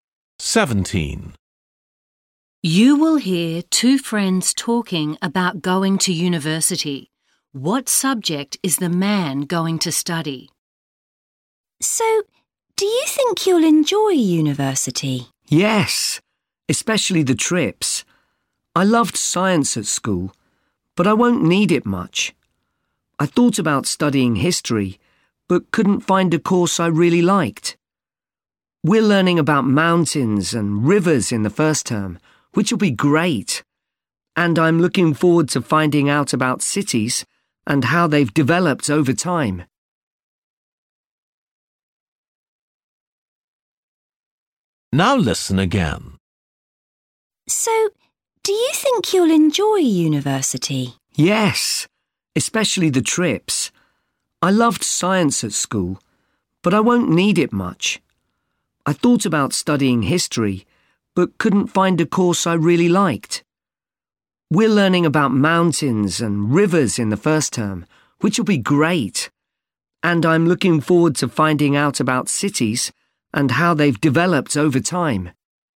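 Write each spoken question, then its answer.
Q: What subject is the man going to study?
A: geography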